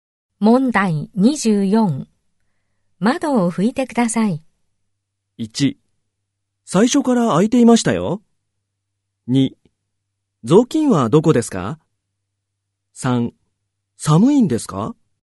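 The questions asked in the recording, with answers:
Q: 窓を拭いてください。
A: 2: 雑巾はどこですか?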